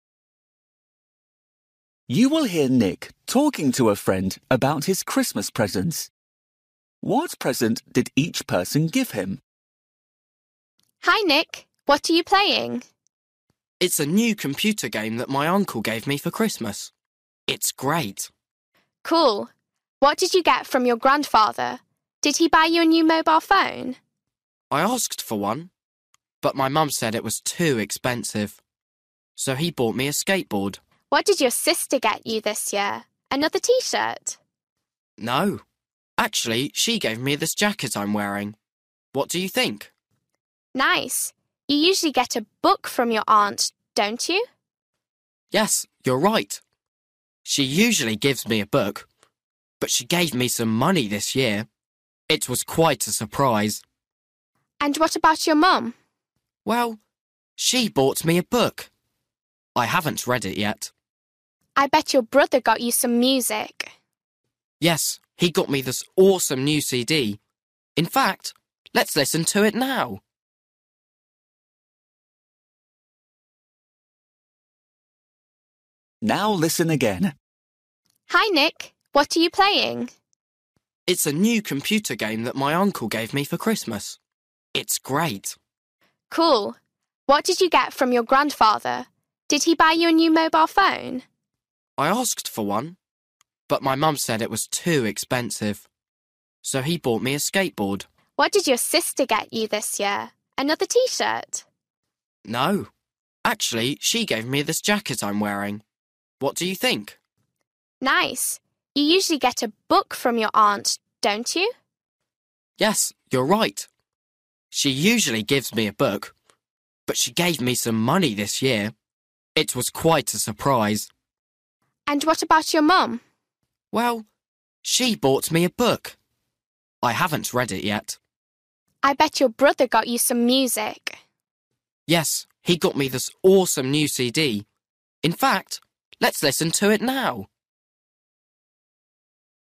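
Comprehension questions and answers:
For each question, choose the correct answer.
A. T-shirt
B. money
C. book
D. music CD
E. mobile phone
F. jacket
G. skateboard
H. computer game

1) Grandfather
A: G. skateboard

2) Sister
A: F. jacket

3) Aunt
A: B. money

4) Mum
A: C. book

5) Brother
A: D. music CD

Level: Luyện nghe trình độ A2

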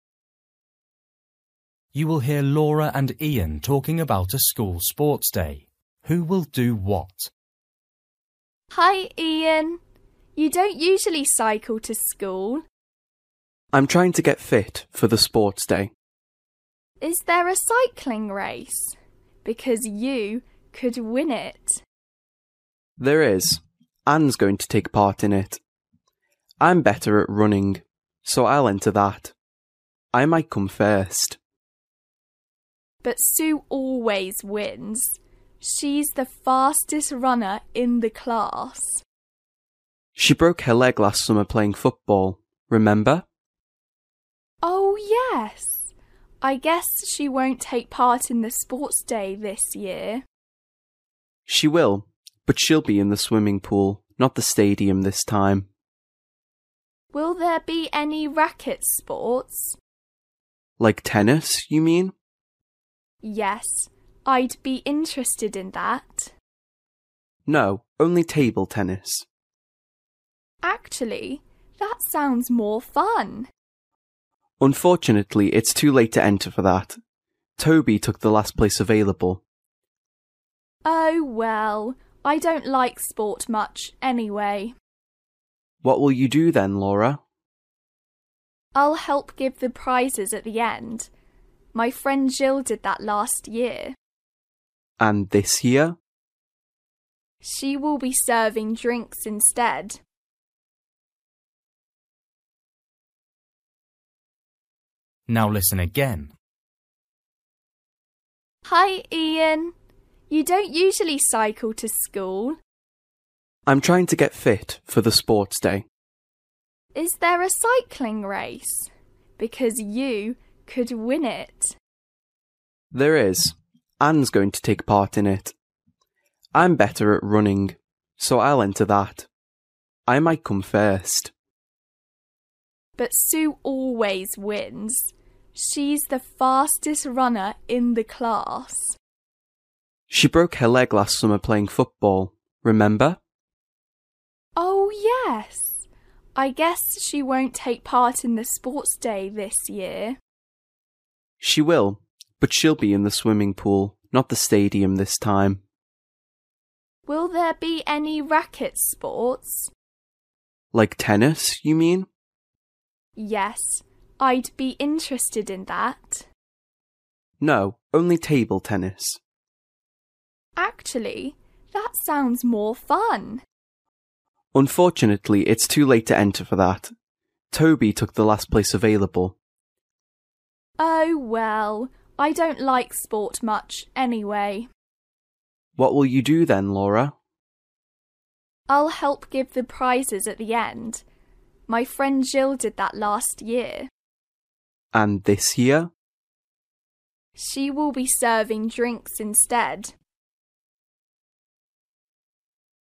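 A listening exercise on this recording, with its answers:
For each question, choose the correct answer.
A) swimming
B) giving prizes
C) running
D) serving drinks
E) cycling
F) table tennis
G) football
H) tennis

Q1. Ian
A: C) running

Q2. Sue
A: A) swimming

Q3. Toby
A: F) table tennis

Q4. Laura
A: B) giving prizes

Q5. Jill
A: D) serving drinks

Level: Luyện nghe trình độ A2

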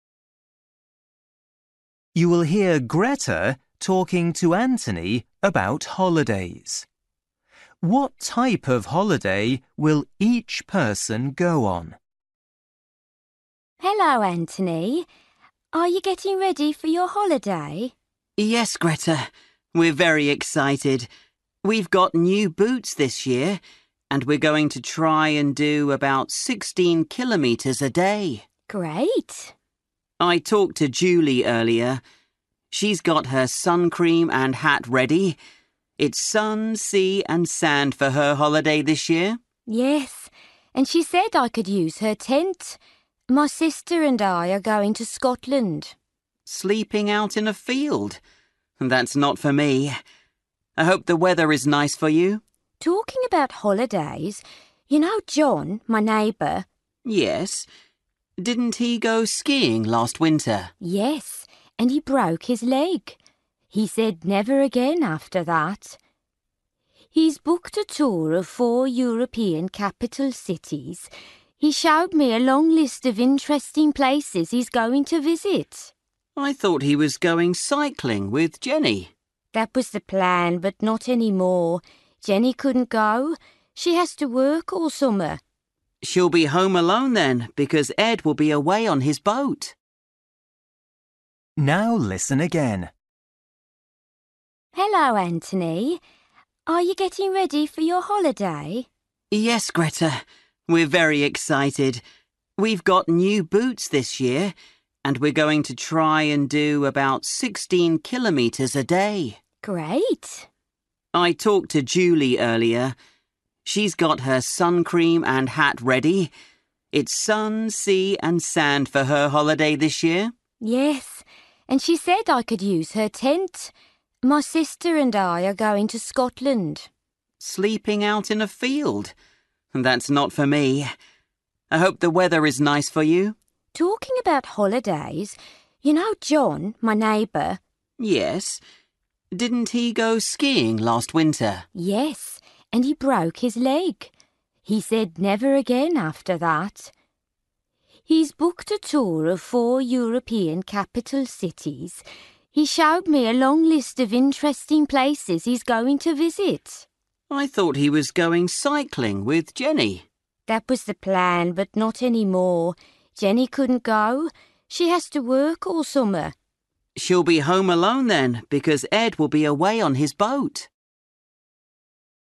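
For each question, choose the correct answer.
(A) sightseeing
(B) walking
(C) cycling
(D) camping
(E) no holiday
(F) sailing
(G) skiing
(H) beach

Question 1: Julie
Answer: (H) beach

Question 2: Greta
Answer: (D) camping

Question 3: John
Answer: (A) sightseeing

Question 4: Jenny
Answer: (E) no holiday

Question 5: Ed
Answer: (F) sailing

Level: Luyện nghe trình độ A2

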